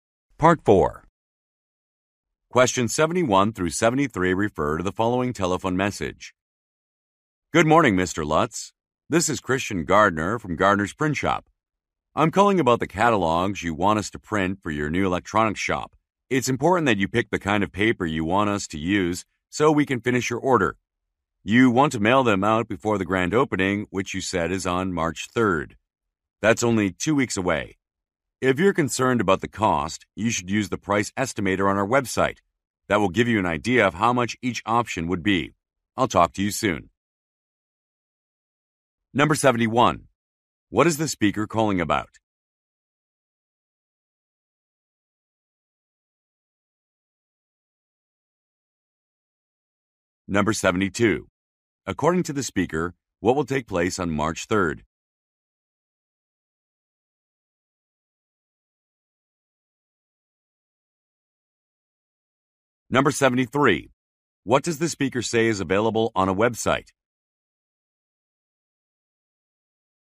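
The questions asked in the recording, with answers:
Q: What is the speaker calling about?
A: Printing catalogs for the listener's new electronics shop (choosing the paper)

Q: According to the speaker, what will take place on March 3rd?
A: The shop's grand opening

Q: What does the speaker say is available on a website?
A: A price estimator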